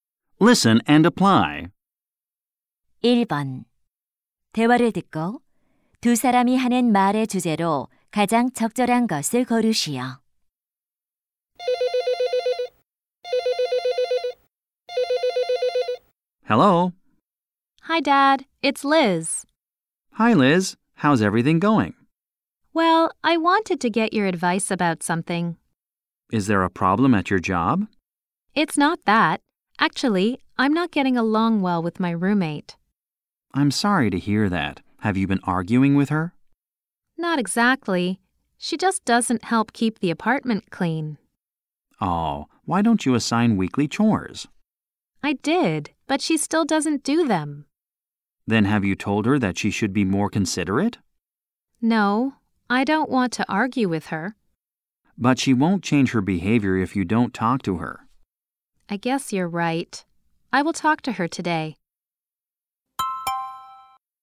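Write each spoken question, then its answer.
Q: 대화를 듣고 두 사람이 하는 말의 주제로 가장 적절한 것을 고르시오.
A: 집 청소를 돕지 않는 룸메이트 문제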